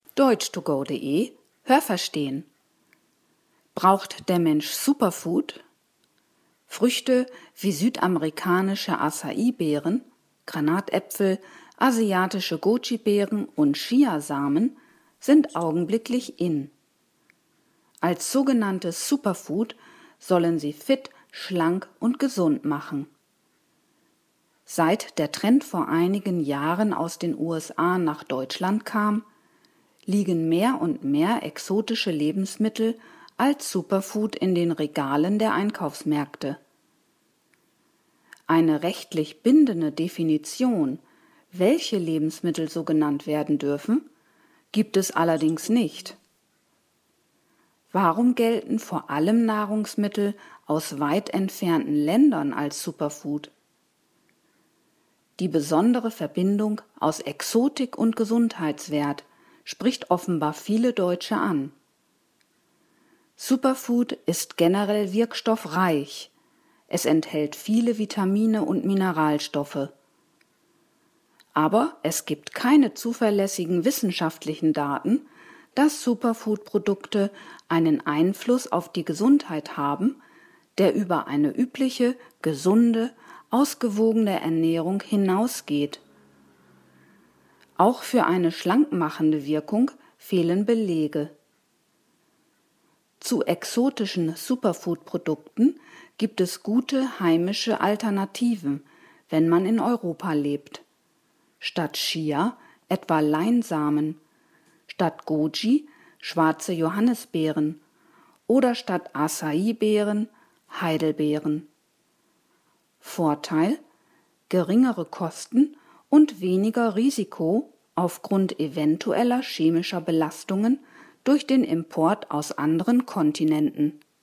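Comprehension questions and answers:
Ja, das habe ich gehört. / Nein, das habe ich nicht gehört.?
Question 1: Der Superfood-Trend stammt aus Asien.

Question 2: Es gibt eine klare Definition, was als Superfood bezeichnet werden darf und was nicht.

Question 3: Superfood beinhaltet viele Wirkstoffe, wie Vitamine und Mineralien.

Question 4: Es gibt keine wissenschaftlichen Daten für einen größeren gesundheitlichen Nutzen von Superfood im Vergleich zu heimischen Samen und Beeren.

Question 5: Superfood macht schlank.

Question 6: Zu exotischen Beeren und Samen gibt es gute und günstige Alternativen wie Heidelbeeren und Leinsamen.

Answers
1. Nein, das habe ich nicht gehört.
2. Nein, das habe ich nicht gehört.
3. Ja, das habe ich gehört.
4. Ja, das habe ich gehört.
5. Nein, das habe ich nicht gehört.
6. Ja, das habe ich gehört.

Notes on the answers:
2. Es gibt keine rechtlich bindende Definition (das heißt, jeder kann irgendein Lebensmittel als Superfood bezeichnen und damit werben).

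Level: B2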